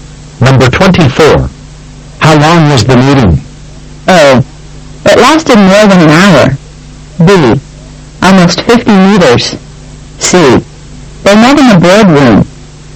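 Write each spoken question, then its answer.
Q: How long was the meeting?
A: A: It lasted more than an hour.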